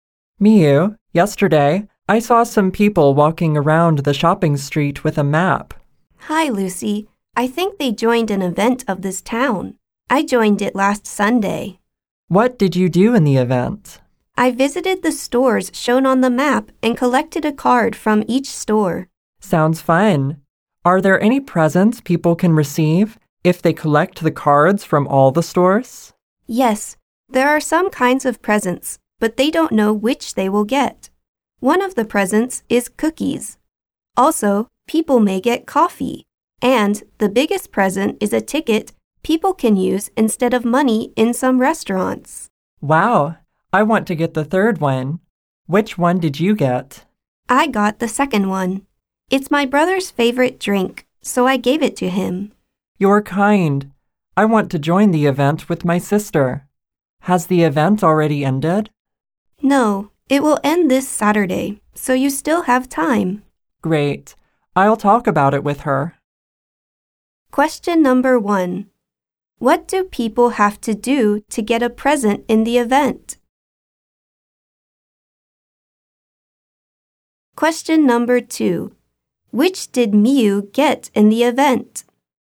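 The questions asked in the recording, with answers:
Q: What do people have to do to get a present in the event?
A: Collect a card from each store shown on the map.

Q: Which did Miu get in the event?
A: Coffee.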